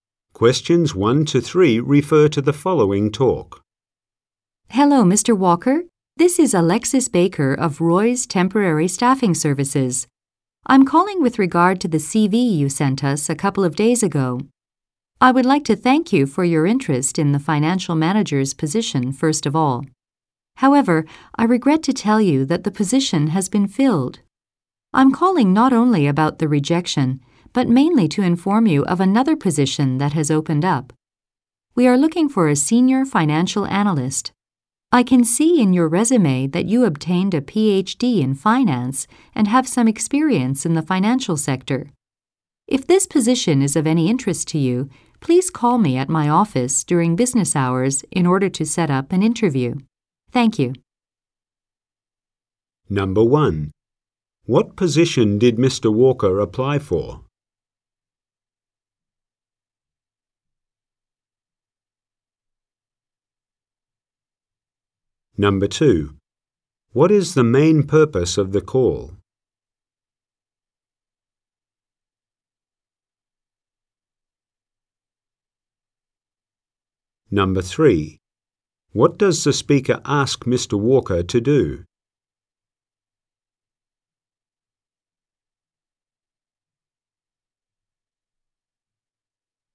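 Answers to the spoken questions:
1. Financial manager
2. To tell him about another open position, senior financial analyst
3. Call her office during business hours to set up an interview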